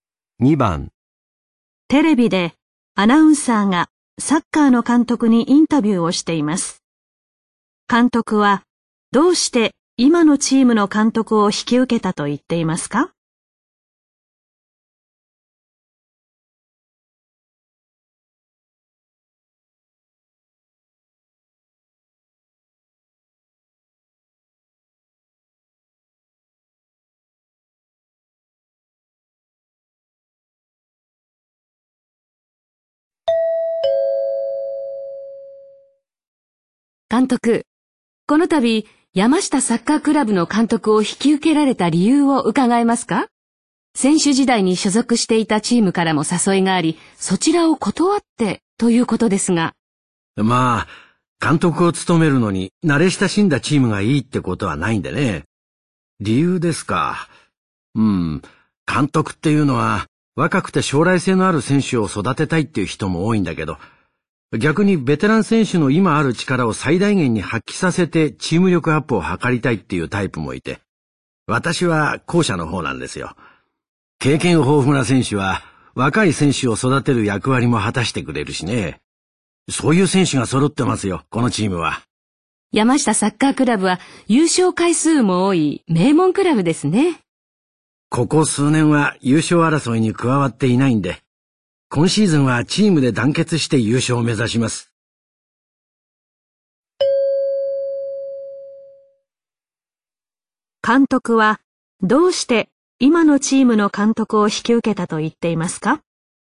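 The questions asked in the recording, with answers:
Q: 監督はどうして今のチームの監督を引き受けたと言っていますか?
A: ベテラン選手の力を最大限に発揮させてチーム力を上げたいから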